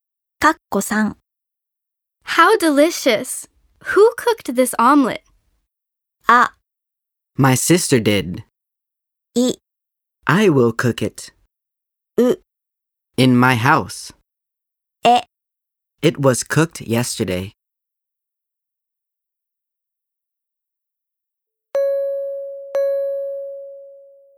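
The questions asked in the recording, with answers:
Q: How delicious! Who cooked this omelet?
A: あ: My sister did.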